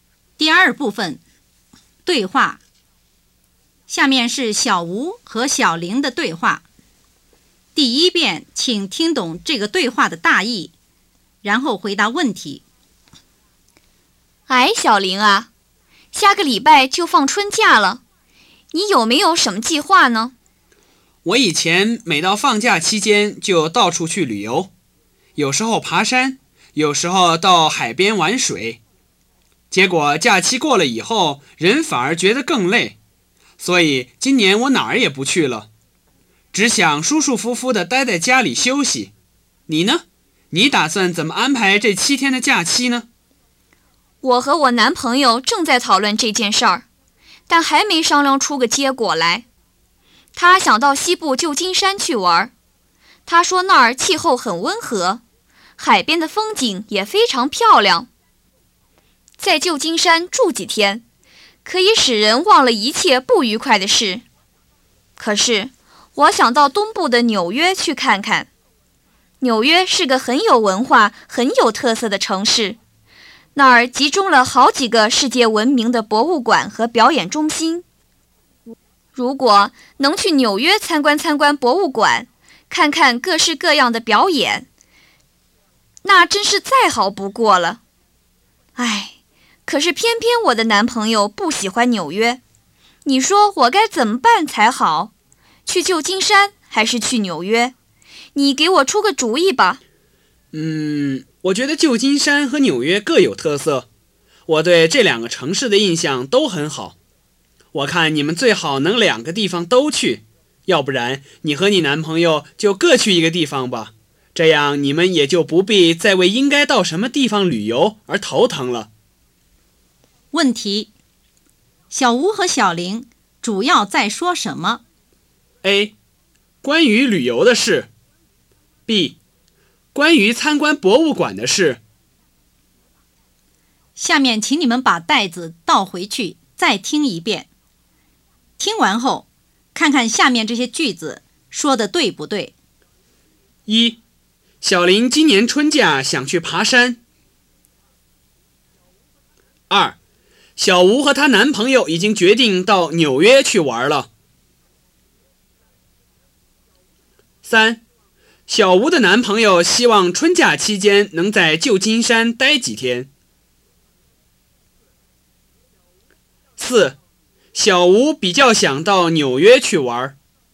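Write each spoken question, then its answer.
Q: 小吴和小玲主要在说什么?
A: A: 关于旅游的事。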